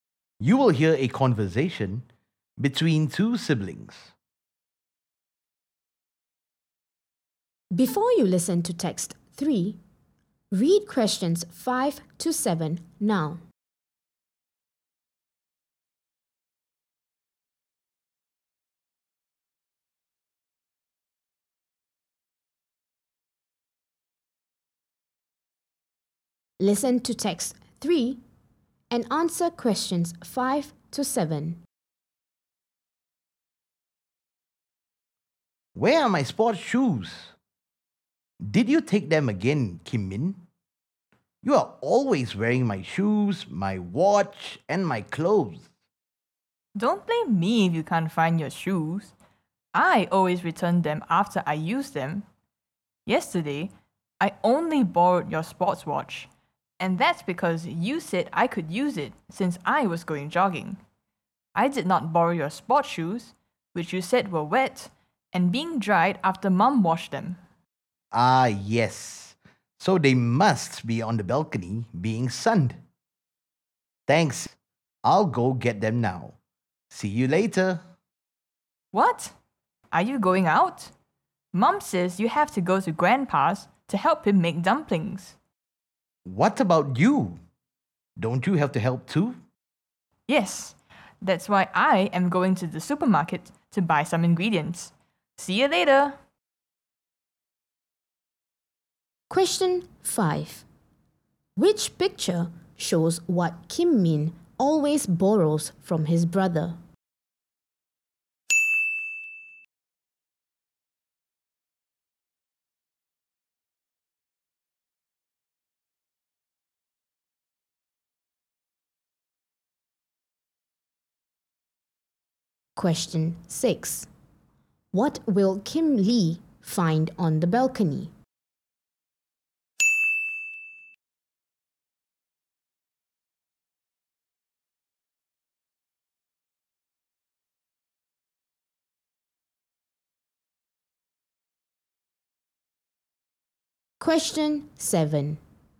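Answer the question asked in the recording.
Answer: his sports shoes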